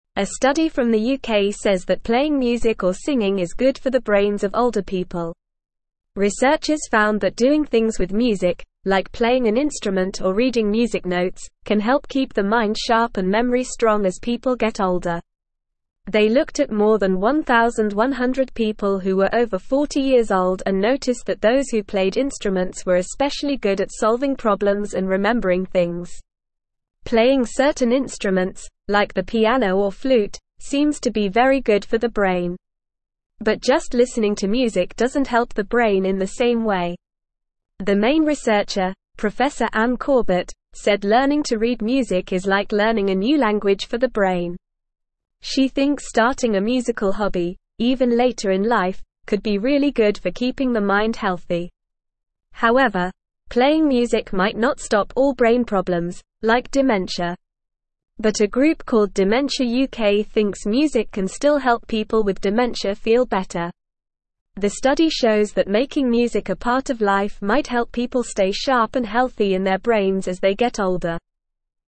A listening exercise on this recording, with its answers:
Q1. A study from the UK says that playing (1)______ or singing is good for the brains of older people.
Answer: music

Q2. Researchers found that doing (2)______ with music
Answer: things

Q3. can help keep the mind (3)______ and memory strong as people get older.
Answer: sharp

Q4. noticed that those who played (4)______ were especially good at solving problems and remembering things.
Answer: instruments

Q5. (5)______ certain instruments, like the piano or (6)______, seems to be very good for the brain.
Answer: Playing

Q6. (5)______ certain instruments, like the piano or (6)______, seems to be very good for the brain.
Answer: flute

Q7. But just listening to music doesn't help the (7)______ in the same way.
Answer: brain

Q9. could be really good for keeping the mind (9)______.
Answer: healthy

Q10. However, playing music might not stop all brain problems, like (10)______.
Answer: dementia

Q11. But a (11)______ called Dementia UK thinks music can still help people with dementia feel better.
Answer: group

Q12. The study shows that making music a (12)______ of life might help people stay sharp and healthy in their brains as they get older.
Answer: part

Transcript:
A study from the UK says that playing music or singing is good for the brains of older people. Researchers found that doing things with music, like playing an instrument or reading music notes, can help keep the mind sharp and memory strong as people get older. They looked at more than 1,100 people who were over 40 years old and noticed that those who played instruments were especially good at solving problems and remembering things.
Playing certain instruments, like the piano or flute, seems to be very good for the brain. But just listening to music doesn't help the brain in the same way. The main researcher, Prof Anne Corbett, said learning to read music is like learning a new language for the brain. She thinks starting a musical hobby, even later in life, could be really good for keeping the mind healthy.
However, playing music might not stop all brain problems, like dementia. But a group called Dementia UK thinks music can still help people with dementia feel better. The study shows that making music a part of life might help people stay sharp and healthy in their brains as they get older.

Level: Level 2